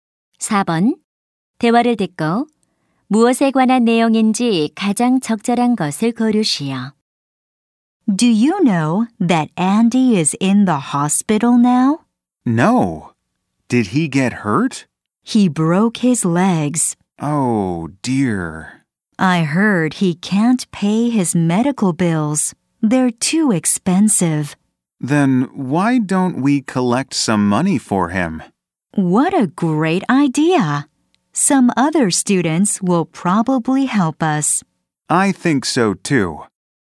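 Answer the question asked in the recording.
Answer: 다친 친구를 위한 모금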